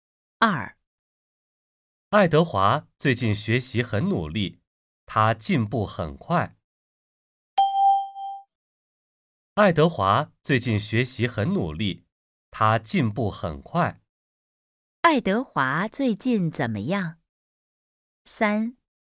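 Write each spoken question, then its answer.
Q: 爱德华最近怎么样?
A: 学习很努力,进步很快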